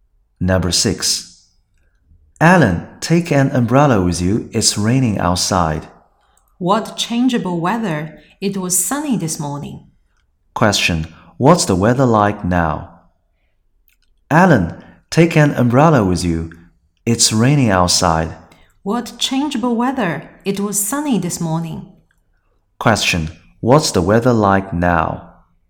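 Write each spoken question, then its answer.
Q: What's the weather like now?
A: It's raining.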